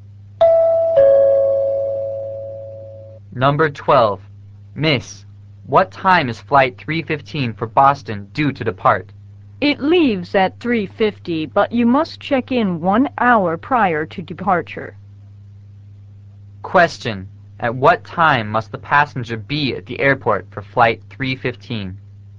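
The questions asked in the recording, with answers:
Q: At what time must the passenger be at the airport for flight 315?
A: By 2:50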